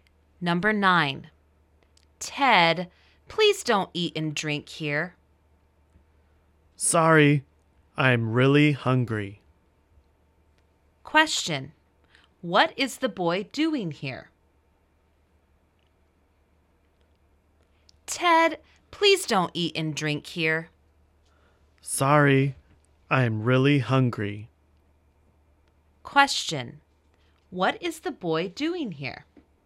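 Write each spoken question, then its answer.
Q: what is the boy doing here?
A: Eating and drinking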